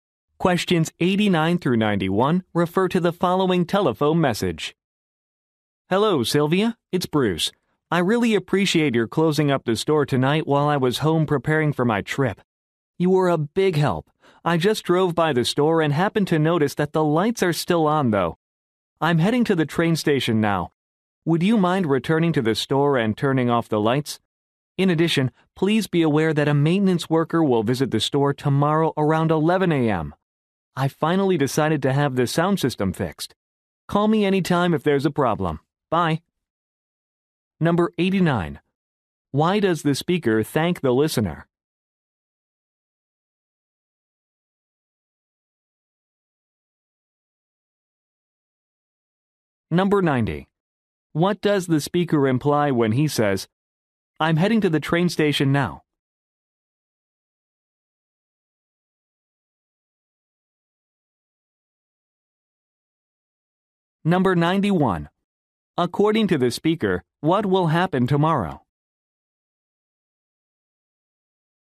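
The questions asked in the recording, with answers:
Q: Why does the speaker thank the listener?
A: For closing up the store

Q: What does the speaker imply when he says, "I'm heading to the train station now"?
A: He can't go back to turn off the lights himself

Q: According to the speaker, what will happen tomorrow?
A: A maintenance worker will fix the sound system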